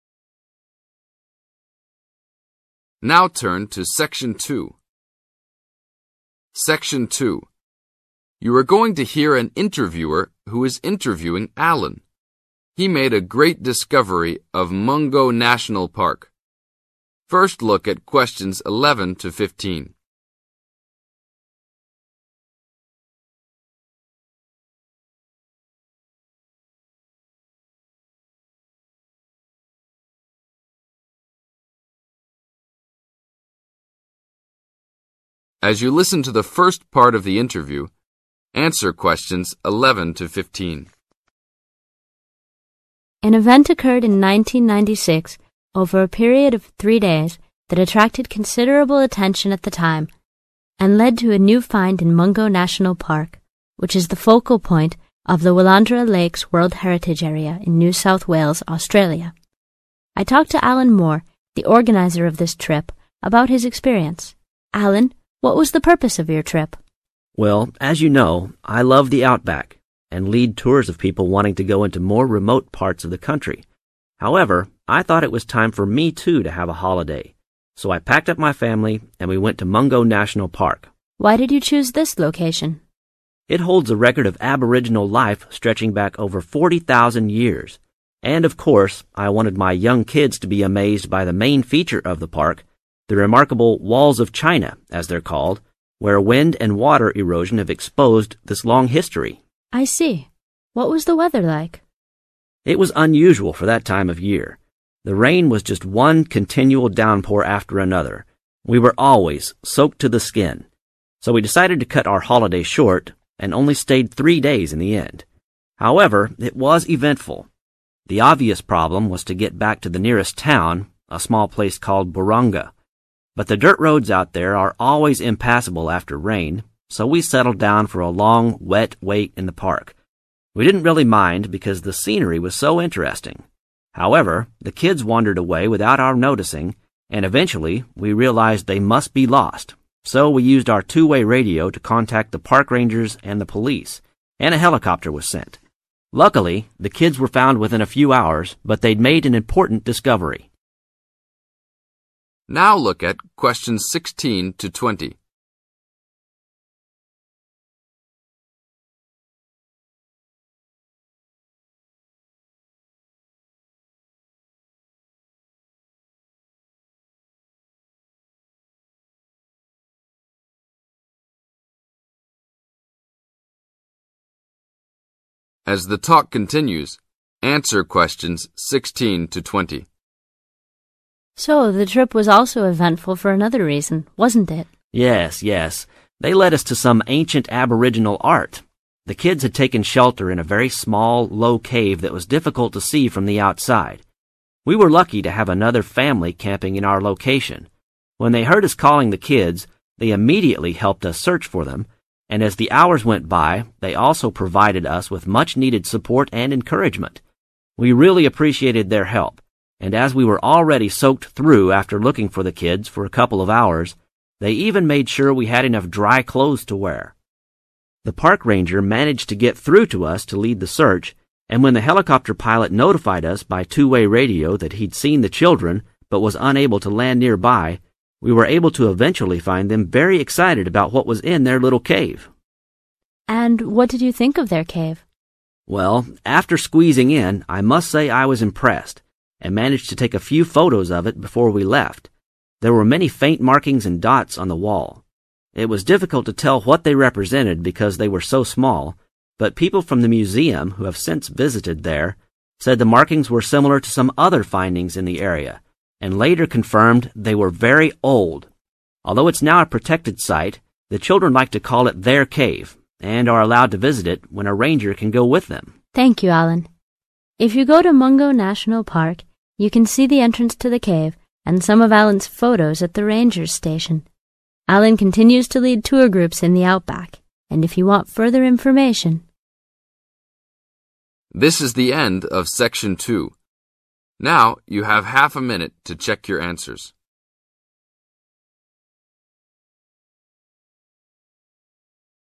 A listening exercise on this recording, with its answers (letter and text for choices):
Complete the notes below. Write NO MORE THAN THREE WORDS for each answer.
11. Purpose of the trip: (11).............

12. Recorded years of Aboriginal life: (12).............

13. Main feature of park is the: (13).............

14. What took Alan by surprise?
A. the amount of rain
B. the main feature of the park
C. evidence of Aboriginal life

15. How did Alan feel about having to wait in the park becaue of rain?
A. he reluctantly accepted it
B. he war irritated by the rain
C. it made no difference to his enjoyment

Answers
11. a holiday
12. over 40,000 years
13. walls of China
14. A. the amount of rain
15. C. it made no difference to his enjoyment